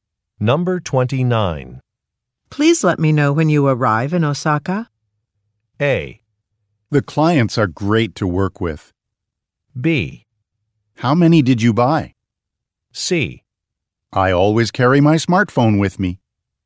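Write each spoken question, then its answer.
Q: Please let me know when you arrive in Osaka.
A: C: I always carry my smartphone with me.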